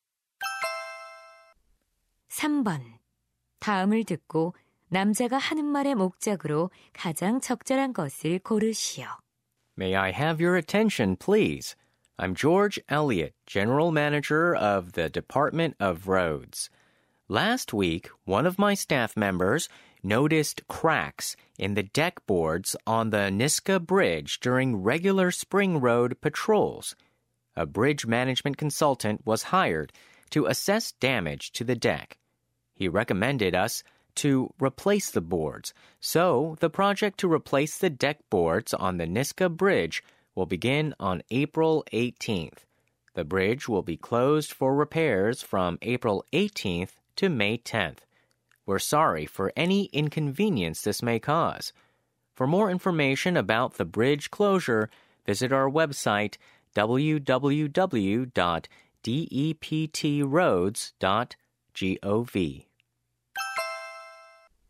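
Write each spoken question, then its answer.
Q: 다음을 듣고 남자가 하는 말의 목적으로 가장 적절한 것을 고르시오.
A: 보수 공사로 인한 니스카 다리 폐쇄를 알리려고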